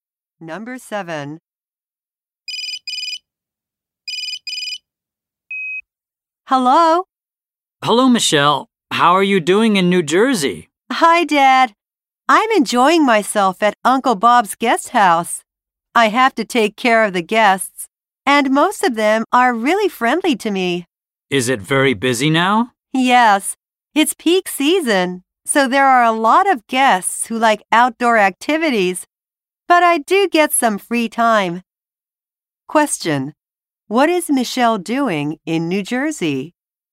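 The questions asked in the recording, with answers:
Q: What is Michelle doing in New Jersey?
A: Working at her uncle's guest house, taking care of guests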